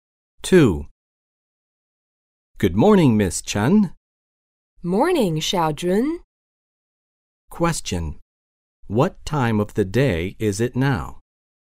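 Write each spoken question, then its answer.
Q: What time of the day is it now?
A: Morning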